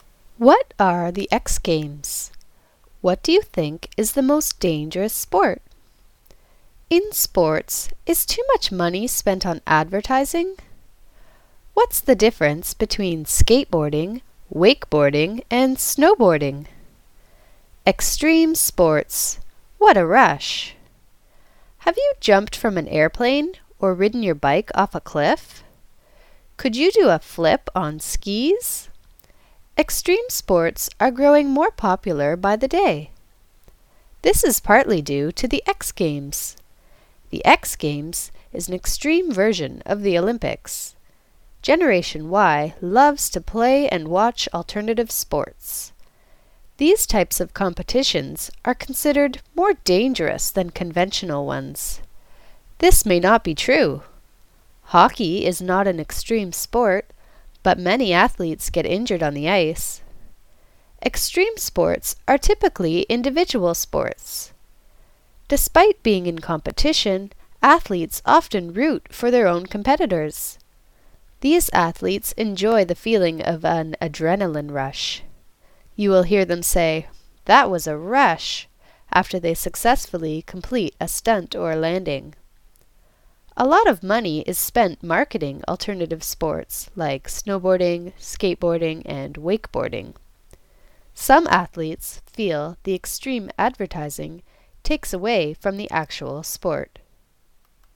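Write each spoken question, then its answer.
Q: What are the X Games?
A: An extreme version of the Olympics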